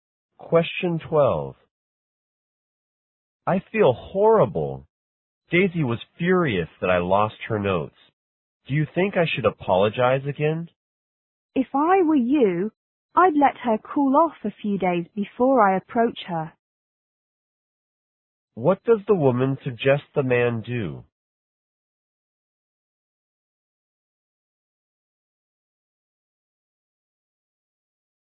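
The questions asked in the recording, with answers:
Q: What does the woman suggest the man do?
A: Wait a few days for Daisy to calm down before approaching her.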